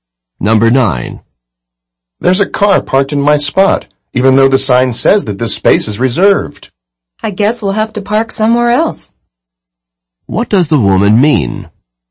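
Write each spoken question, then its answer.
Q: What does the woman mean?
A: They have to park somewhere else.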